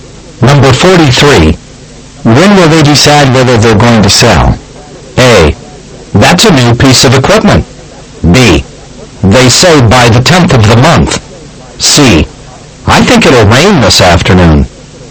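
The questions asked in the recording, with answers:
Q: When will they decide whether they're going to sell?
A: B: They say by the 10th of the month.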